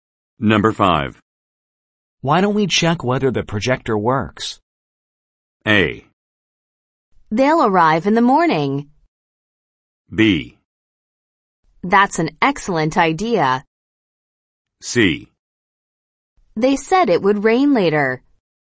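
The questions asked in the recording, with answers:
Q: Why don't we check whether the projector works?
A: B: That's an excellent idea.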